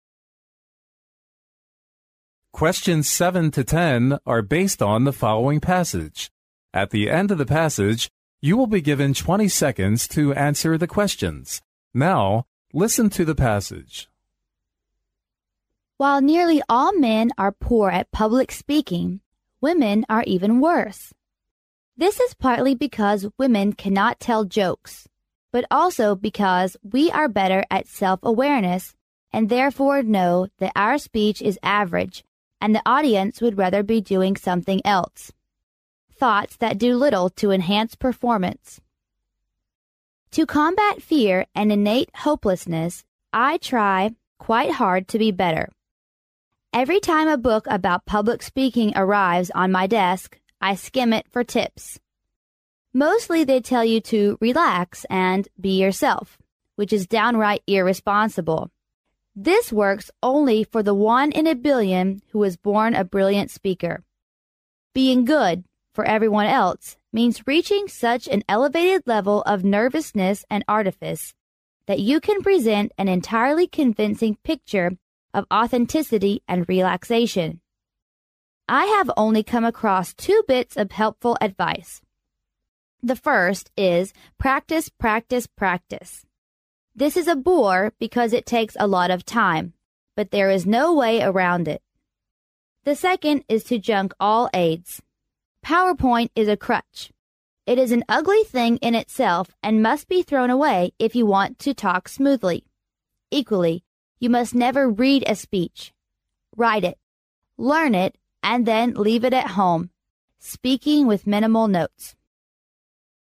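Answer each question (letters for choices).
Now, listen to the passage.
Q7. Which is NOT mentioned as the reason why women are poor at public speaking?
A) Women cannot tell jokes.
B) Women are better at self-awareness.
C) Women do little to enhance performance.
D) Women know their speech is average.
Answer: C

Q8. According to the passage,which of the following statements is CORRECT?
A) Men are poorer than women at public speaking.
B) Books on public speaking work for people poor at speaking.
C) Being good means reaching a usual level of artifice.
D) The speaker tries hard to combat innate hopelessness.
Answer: D

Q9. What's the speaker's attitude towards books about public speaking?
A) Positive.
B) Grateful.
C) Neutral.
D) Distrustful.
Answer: D

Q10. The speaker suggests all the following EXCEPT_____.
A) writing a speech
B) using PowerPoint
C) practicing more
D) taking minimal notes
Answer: B

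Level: 英语四级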